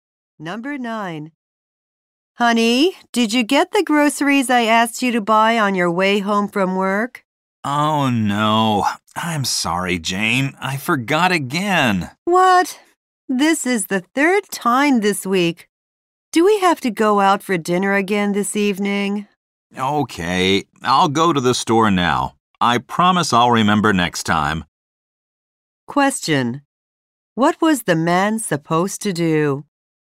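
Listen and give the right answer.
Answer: Buy groceries on his way home from work.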